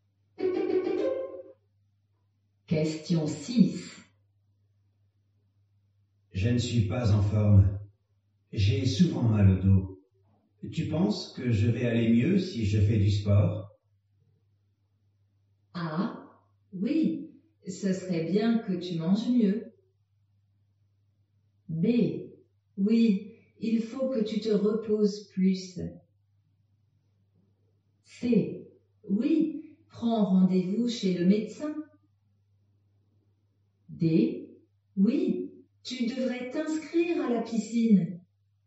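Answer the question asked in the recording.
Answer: D: Oui, tu devrais t'inscrire à la piscine.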